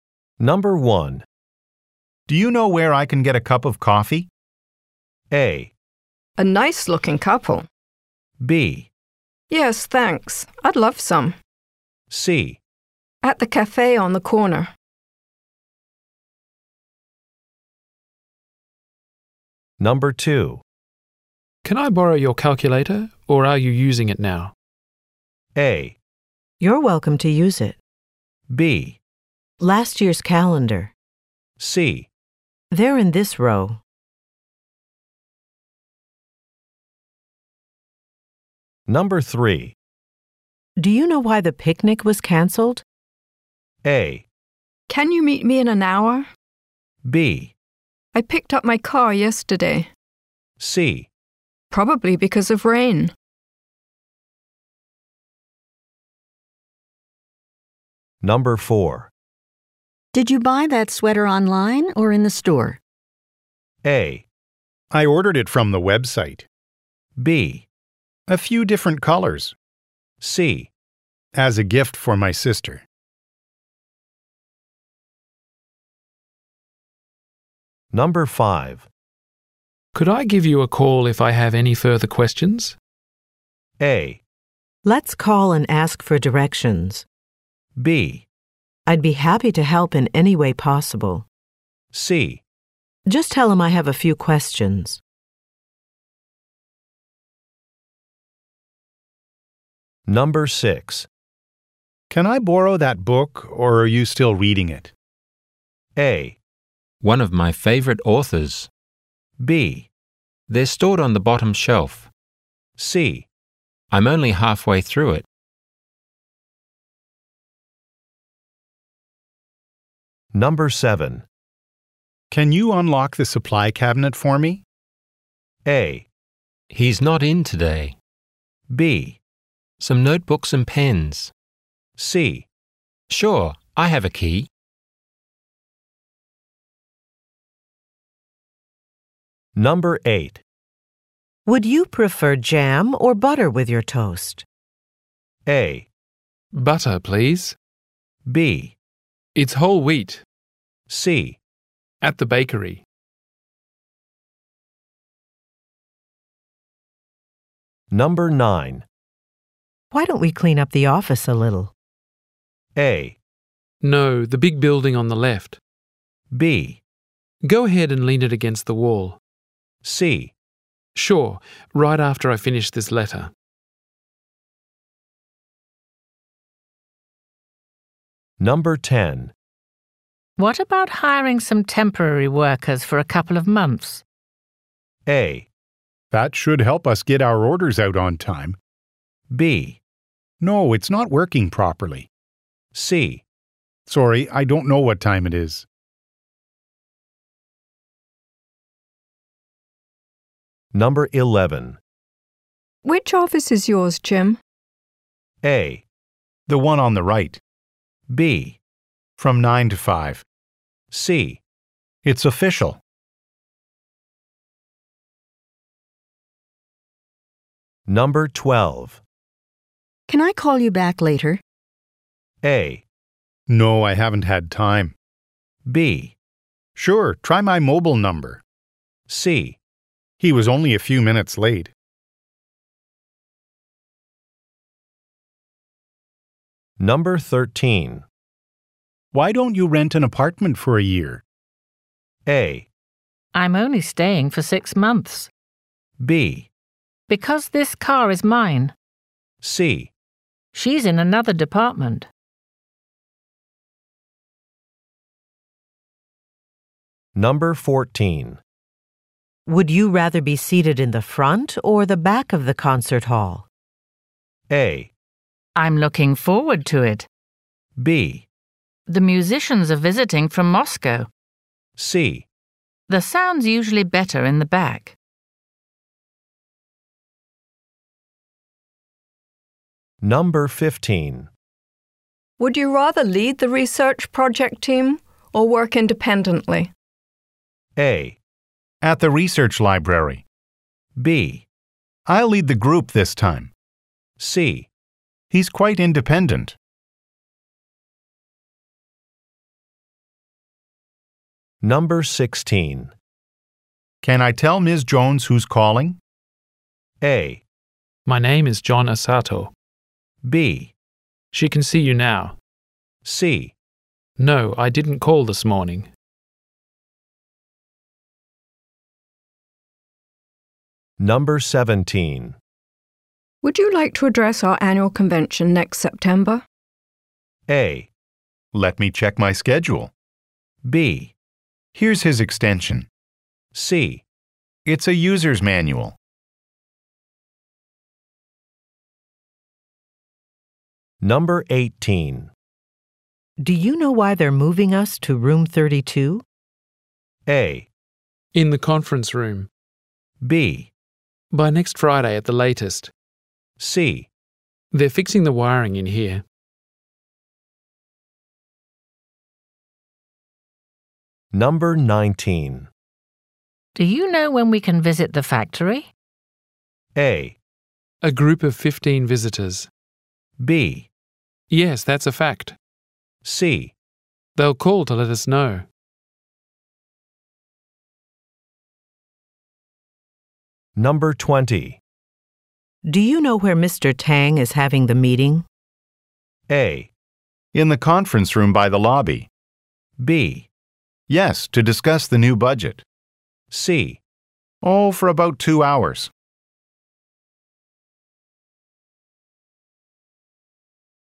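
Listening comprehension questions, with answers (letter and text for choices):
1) Do you know where I can get a cup of coffee?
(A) A nice-looking couple.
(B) Yes, thanks. I'd love some.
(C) At the cafe on the corner.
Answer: (C) At the cafe on the corner.

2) Can I borrow your calculator, or are you using it now?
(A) You're welcome to use it.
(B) Last year's calendar.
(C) They're in this row.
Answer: (A) You're welcome to use it.

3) Do you know why the picnic was canceled?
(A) Can you meet me in an hour?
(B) I picked up my car yesterday.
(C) Probably because of rain.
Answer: (C) Probably because of rain.

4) Did you buy that sweater online, or in the store?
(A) I ordered it from the Web site.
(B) A few different colors.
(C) As a gift for my sister.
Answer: (A) I ordered it from the Web site.

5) Could I give you a call if I have any further questions?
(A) Let's call and ask for directions.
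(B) I'd be happy to help in any way possible.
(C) Just tell him I have a few questions.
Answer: (B) I'd be happy to help in any way possible.

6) Can I borrow that book, or are you still reading it?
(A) One of my favorite authors.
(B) They're stored on the bottom shelf.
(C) I'm only halfway through it.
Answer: (C) I'm only halfway through it.

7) Can you unlock the supply cabinet for me?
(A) He's not in today.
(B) Some notebooks and pens.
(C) Sure, I have a key.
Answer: (C) Sure, I have a key.

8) Would you prefer jam or butter with your toast?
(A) Butter, please.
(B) It's whole wheat.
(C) At the bakery.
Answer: (A) Butter, please.

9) Why don't we clean up the office a little?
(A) No, the big building on the left.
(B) Go ahead and lean it against the wall.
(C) Sure, right after I finish this letter.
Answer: (C) Sure, right after I finish this letter.

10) What about hiring some temporary workers for a couple of months?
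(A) That should help us get our orders out on time.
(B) No, it's not working properly.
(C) Sorry, I don't know what time it is.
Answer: (A) That should help us get our orders out on time.

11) Which office is yours, Jim?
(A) The one on the right.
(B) From nine to five.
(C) It's official.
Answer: (A) The one on the right.

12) Can I call you back later?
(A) No, I haven't had time.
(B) Sure, try my mobile number.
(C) He was only a few minutes late.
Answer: (B) Sure, try my mobile number.

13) Why don't you rent an apartment for a year?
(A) I'm only staying for six months.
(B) Because this car is mine.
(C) She's in another department.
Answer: (A) I'm only staying for six months.

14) Would you rather be seated in the front or the back of the concert hall?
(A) I'm looking forward to it.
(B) The musicians are visiting from Moscow.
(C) The sound's usually better in the back.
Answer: (C) The sound's usually better in the back.

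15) Would you rather lead the research project team, or work independently?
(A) At the research library.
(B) I'll lead the group this time.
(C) He's quite independent.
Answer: (B) I'll lead the group this time.

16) Can I tell Ms. Jones who's calling?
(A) My name is John Asato.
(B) She can see you now.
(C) No, I didn't call this morning.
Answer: (A) My name is John Asato.

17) Would you like to address our annual convention next September?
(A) Let me check my schedule.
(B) Here's his extension.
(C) It's a user's manual.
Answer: (A) Let me check my schedule.

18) Do you know why they're moving us to room 32?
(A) In the conference room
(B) By next Friday at the latest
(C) They're fixing the wiring in here.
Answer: (C) They're fixing the wiring in here.

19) Do you know when we can visit the factory?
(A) A group of fifteen visitors.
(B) Yes, that's a fact.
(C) They'll call to let us know.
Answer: (C) They'll call to let us know.

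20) Do you know where Mr. Tang is having the meeting?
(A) In the conference room by the lobby.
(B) Yes, to discuss the new budget.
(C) Oh, for about two hours.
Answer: (A) In the conference room by the lobby.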